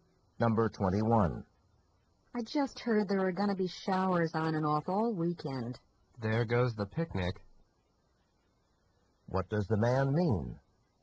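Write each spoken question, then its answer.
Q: What does the man mean?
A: The picnic will probably be canceled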